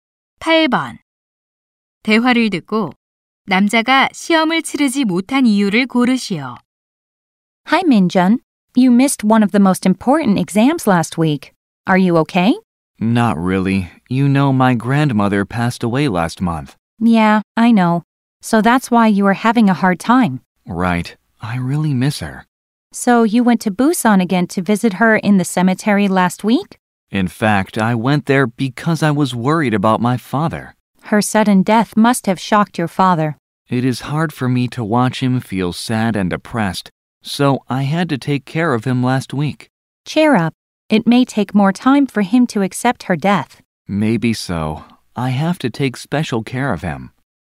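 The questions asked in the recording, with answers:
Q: 대화를 듣고 남자가 시험을 치르지 못한 이유를 고르시오.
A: 상심한 아버지를 돌봐야 해서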